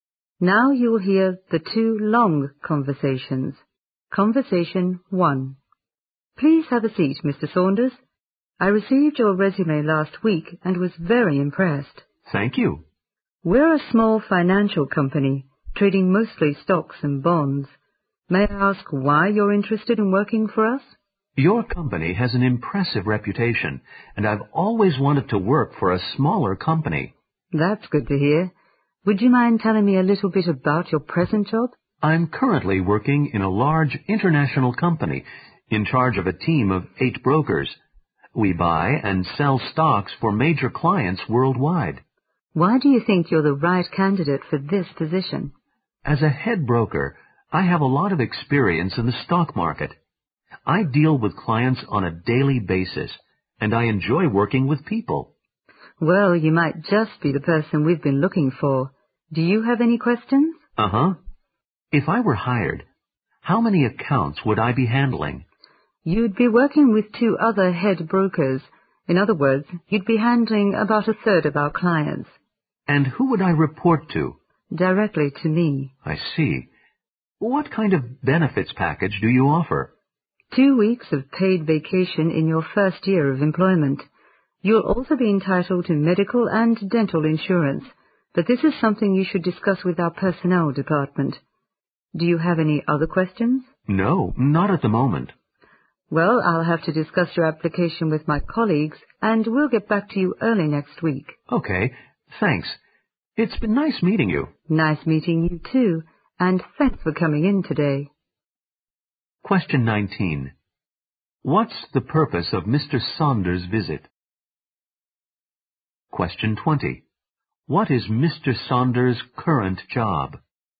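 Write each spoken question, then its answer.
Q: What's the purpose of Mr. Saunders' visit?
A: To have a job interview

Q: What is Mr. Saunders' current job?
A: Head broker in a large international company, in charge of a team of 8 brokers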